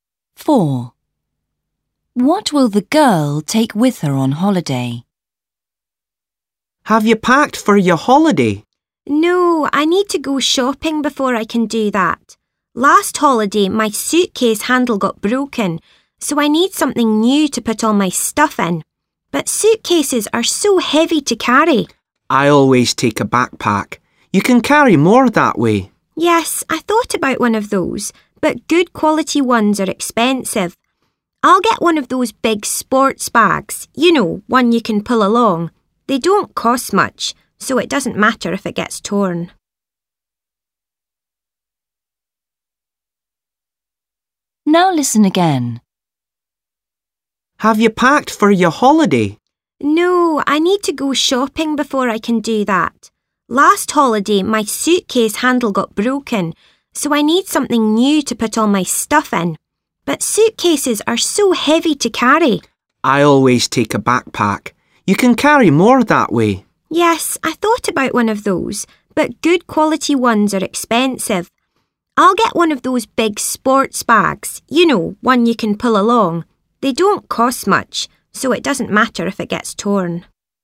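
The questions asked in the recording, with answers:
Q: What will the girl take with her on holiday?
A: A big sports bag you can pull along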